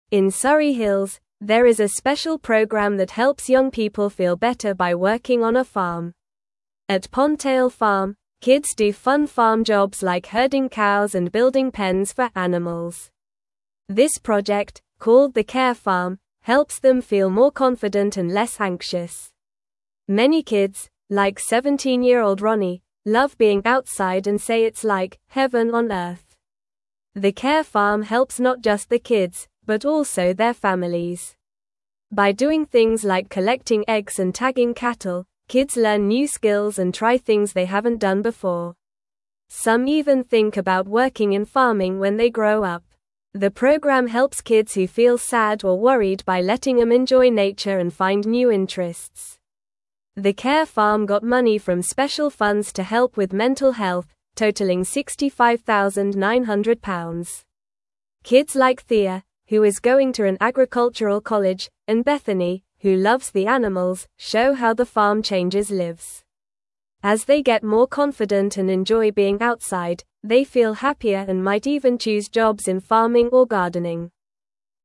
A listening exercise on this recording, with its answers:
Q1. What is the name of the special program in Surrey Hills that helps young people?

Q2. What kind of jobs do kids do at Pondtail Farm?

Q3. How does the Care Farm help kids feel better?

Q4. Can you name two activities kids do at the Care Farm?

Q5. How much money did the Care Farm receive to help with mental health?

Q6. What do some kids think about doing when they grow up after working on the farm?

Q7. How do kids like Thea and Bethany show that the farm changes lives?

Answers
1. The name of the special program is the Care Farm.
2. Kids do fun jobs like herding cows and building pens for animals.
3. The Care Farm helps kids feel better by making them more confident and less anxious.
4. Kids collect eggs and tag cattle at the Care Farm.
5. The Care Farm received £65,900 to help with mental health.
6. Some kids think about working in farming when they grow up.
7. Thea is going to an agricultural college, and Bethany loves the animals, showing how the farm helps them grow and feel happier.

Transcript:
In Surrey Hills, there is a special program that helps young people feel better by working on a farm. At Pondtail Farm, kids do fun farm jobs like herding cows and building pens for animals. This project, called the Care Farm, helps them feel more confident and less anxious. Many kids, like 17-year-old Ronnie, love being outside and say it's like "heaven on earth."
The Care Farm helps not just the kids, but also their families. By doing things like collecting eggs and tagging cattle, kids learn new skills and try things they haven't done before. Some even think about working in farming when they grow up. The program helps kids who feel sad or worried by letting them enjoy nature and find new interests.
The Care Farm got money from special funds to help with mental health, totaling £65,900. Kids like Thea, who is going to an agricultural college, and Bethany, who loves the animals, show how the farm changes lives. As they get more confident and enjoy being outside, they feel happier and might even choose jobs in farming or gardening.

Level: Level 2